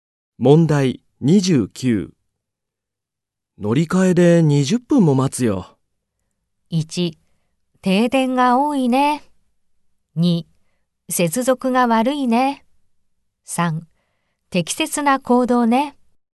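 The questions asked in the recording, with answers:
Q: 乗り換えで20分も待つよ。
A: 2: 接続が悪いね。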